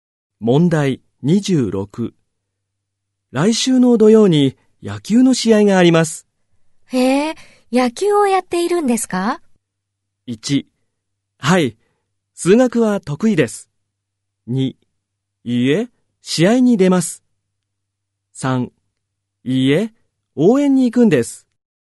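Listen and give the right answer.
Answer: 3: いいえ、応援に行くんです。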